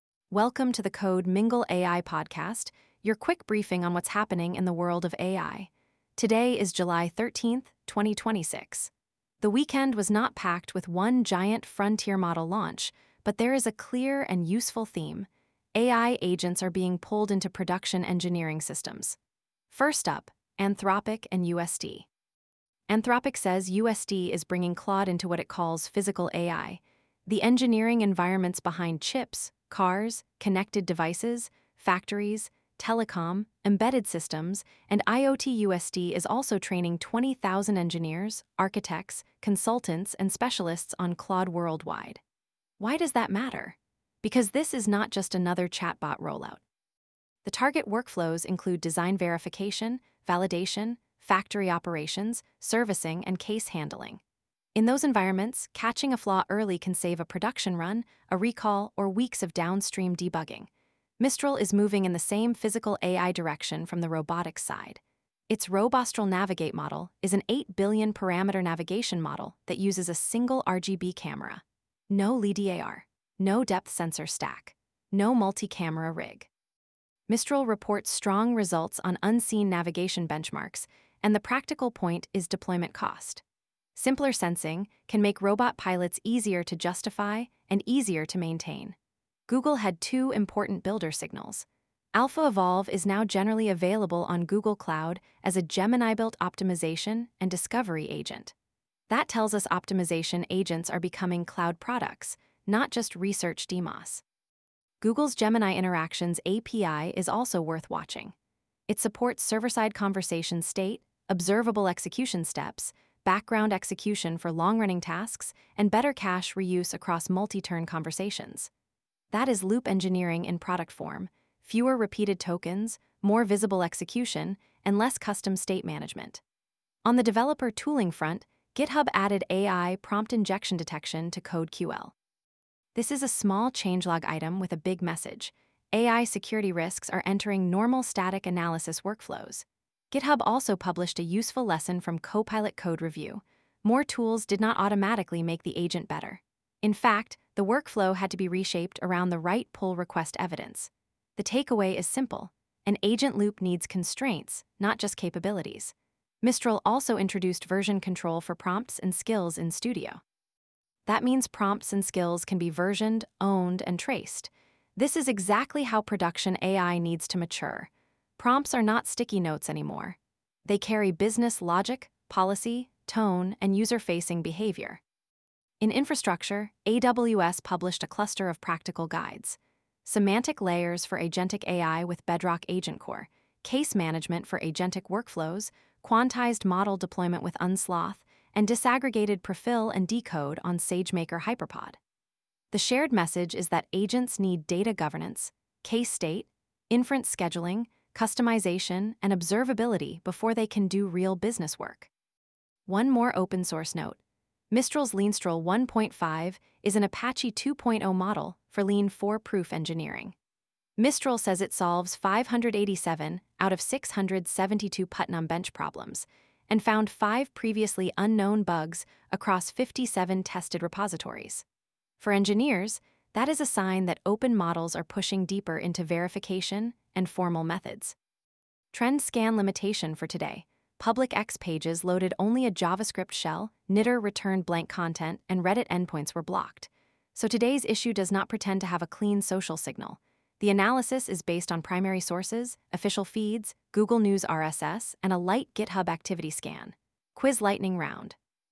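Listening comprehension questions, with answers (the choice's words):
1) What is the most important adoption signal in Anthropic's UST partnership?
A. Claude is being used only for consumer chat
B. UST plans to train 20,000 employees and embed Claude into engineering and production workflows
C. Anthropic released a new image model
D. UST stopped using AI in manufacturing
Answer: UST plans to train 20,000 employees and embed Claude into engineering and production workflows

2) Why is Google's Gemini Interactions API relevant to token-cost reduction?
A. It removes all context from conversations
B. It supports optional server-side state that can improve cache reuse across multi-turn conversations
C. It only runs models on user laptops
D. It disables background tasks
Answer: It supports optional server-side state that can improve cache reuse across multi-turn conversations

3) What security capability did GitHub add in CodeQL 2.26.0?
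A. AI prompt injection detection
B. Automatic GPU provisioning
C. A new robotics simulator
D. Browser-based video generation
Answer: AI prompt injection detection

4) What makes Mistral's Robostral Navigate practically interesting for robotics deployment?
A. It requires LiDAR and multiple depth cameras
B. It uses a single RGB camera and reports strong unseen-environment navigation results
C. It is only a cloud billing tool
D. It replaces all robot sensors with text prompts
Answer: It uses a single RGB camera and reports strong unseen-environment navigation results

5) What is Mistral Studio's new prompt and skills feature mainly trying to solve?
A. Unmanaged prompts with no versioning, ownership, or traceability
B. A shortage of image filters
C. Slow keyboard shortcuts in IDEs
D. The need to remove audit logs from AI systems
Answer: Unmanaged prompts with no versioning, ownership, or traceability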